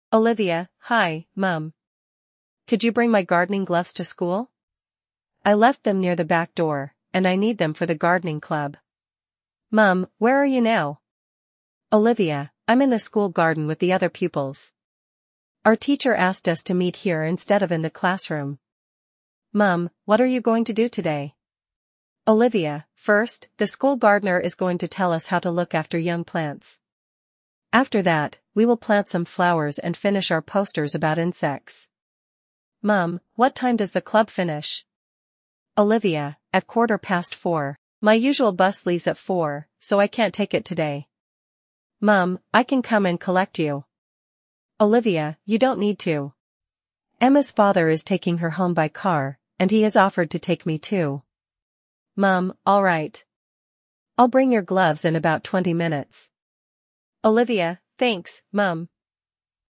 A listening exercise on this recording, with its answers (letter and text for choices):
Ты услышишь диалог. Для каждого предложения А–Е выбери один правильный вариант ответа из трёх предложенных: 1, 2 или 3. Ты услышишь текст дважды.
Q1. Why is Olivia calling her mother?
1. She wants her mother to bring something.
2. She wants permission to visit a friend.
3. She needs help with her homework.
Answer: 1. She wants her mother to bring something.

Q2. Where is Olivia now?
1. In the school library.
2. In the art room.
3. In the school garden.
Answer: 3. In the school garden.

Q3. What are the pupils going to do first?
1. Plant some flowers.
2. Finish their posters.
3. Listen to the gardener.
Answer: 3. Listen to the gardener.

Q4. Why can't Olivia take the usual school bus?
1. She has lost her bus card.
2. The activity finishes after the bus leaves.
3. The bus does not stop near her home.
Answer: 2. The activity finishes after the bus leaves.

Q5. How will Olivia get home?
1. Her mother will collect her.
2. She will walk with Emma.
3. Emma's father will drive her.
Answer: 3. Emma's father will drive her.

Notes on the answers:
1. Olivia просит маму принести садовые перчатки, которые она оставила дома.
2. Во время разговора Olivia находится в школьном саду.
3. Сначала ученики будут слушать школьного садовника.
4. Кружок заканчивается в 4:15, а школьный автобус отправляется в 4:00.
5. Домой Olivia отвезёт отец её подруги Emma.

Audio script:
Olivia: Hi, Mum. Could you bring my gardening gloves to school? I left them near the back door, and I need them for the gardening club.
Mum: Where are you now?
Olivia: I'm in the school garden with the other pupils. Our teacher asked us to meet here instead of in the classroom.
Mum: What are you going to do today?
Olivia: First, the school gardener is going to tell us how to look after young plants. After that, we will plant some flowers and finish our posters about insects.
Mum: What time does the club finish?
Olivia: At quarter past four. My usual bus leaves at four, so I can't take it today.
Mum: I can come and collect you.
Olivia: You don't need to. Emma's father is taking her home by car, and he has offered to take me too.
Mum: All right. I'll bring your gloves in about twenty minutes.
Olivia: Thanks, Mum!

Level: 4 классе